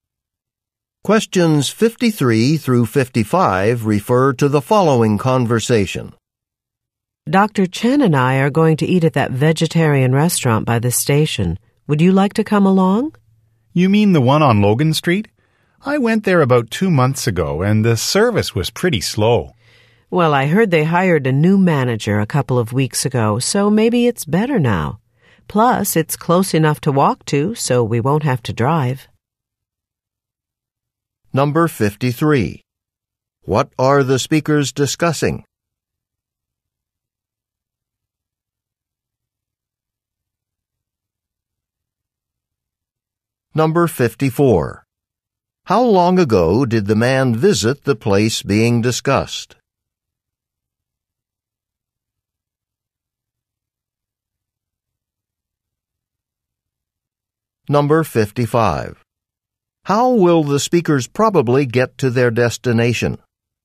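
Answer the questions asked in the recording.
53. A vegetarian restaurant where they might eat
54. About 2 months ago
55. They will walk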